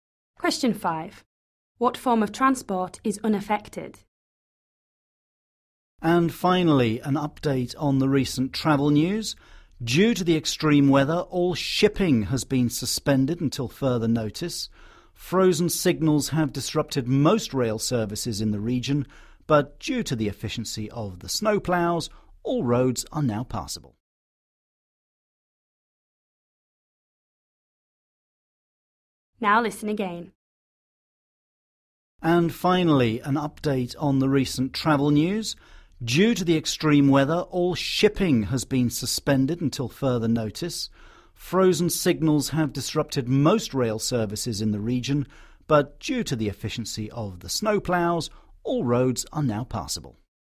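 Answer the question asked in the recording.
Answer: road transport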